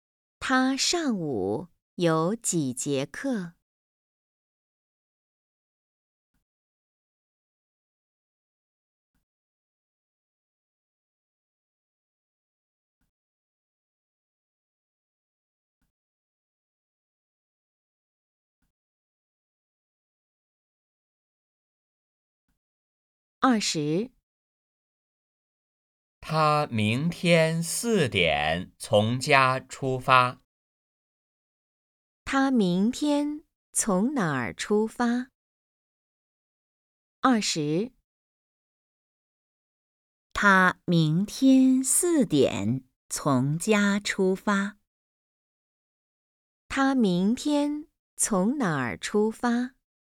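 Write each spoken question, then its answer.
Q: 他明天从哪儿出发?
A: 从家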